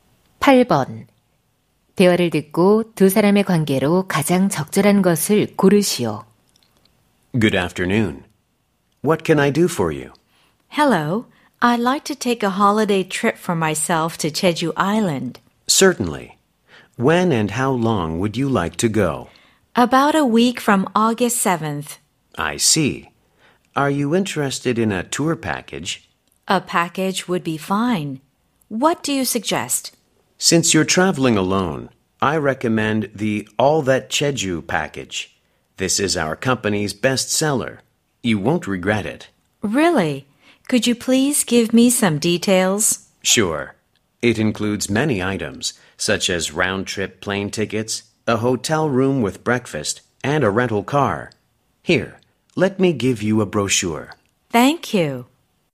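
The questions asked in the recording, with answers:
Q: 대화를 듣고 두 사람의 관계로 가장 적절한 것을 고르시오.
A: 여행사 직원 - 고객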